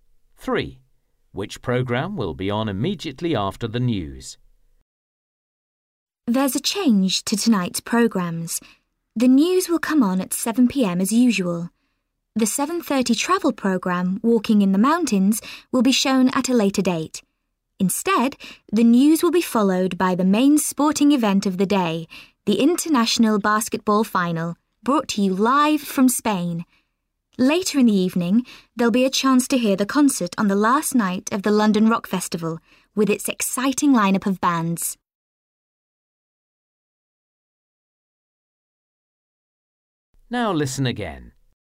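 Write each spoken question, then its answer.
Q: Which programme will be on immediately after the news?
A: the International Basketball Final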